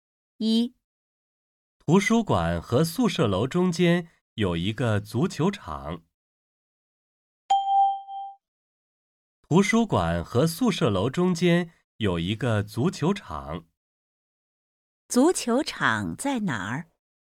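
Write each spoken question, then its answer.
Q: 足球场在哪儿?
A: 在图书馆和宿舍楼中间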